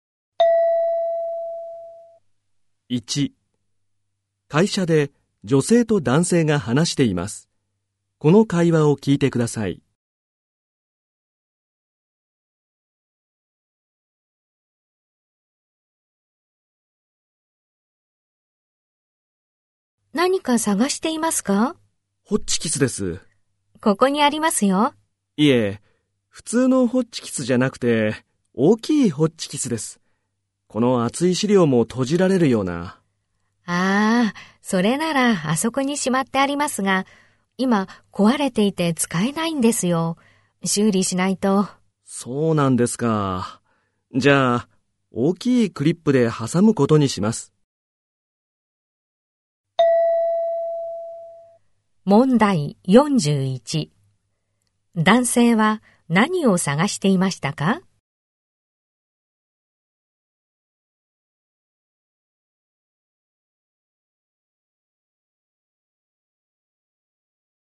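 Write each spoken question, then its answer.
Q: 男性は何を探していましたか?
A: 大きいホッチキス

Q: 男性はこの後どうしますか?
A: 大きいクリップで資料を挟む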